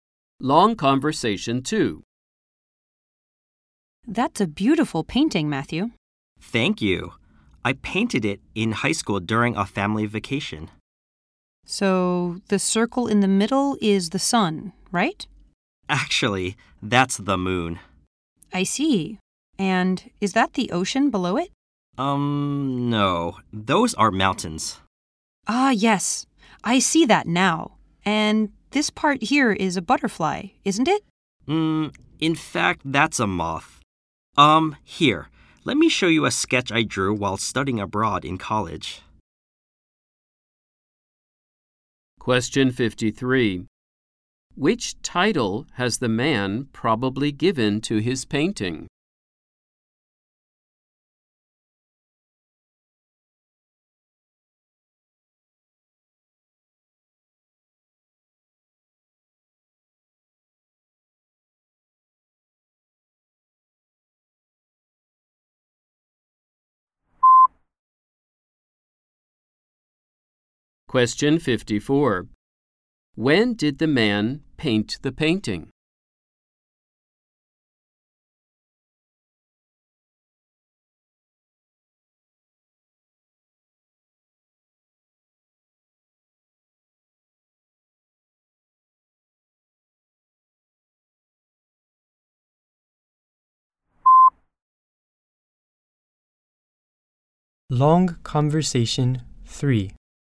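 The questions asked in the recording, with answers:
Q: When did the man paint the painting?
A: In high school, during a family vacation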